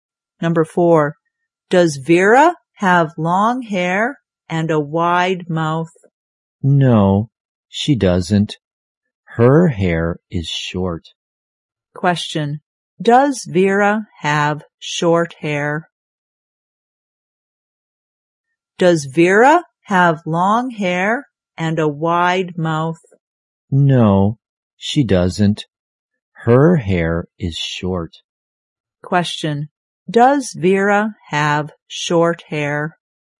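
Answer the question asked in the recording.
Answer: Yes, she does.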